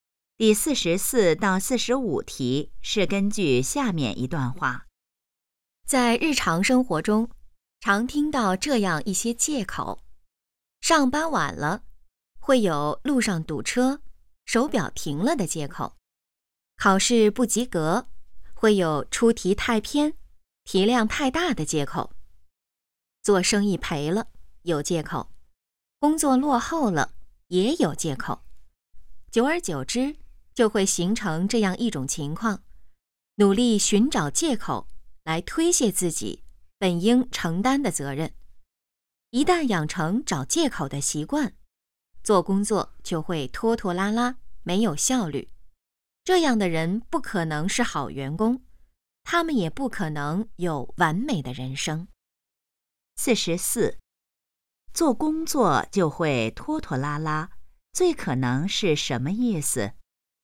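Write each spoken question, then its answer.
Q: 做工作就会拖拖拉拉,最可能是什么意思?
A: 没有效率

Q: 这段话主要谈什么?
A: 不要找借口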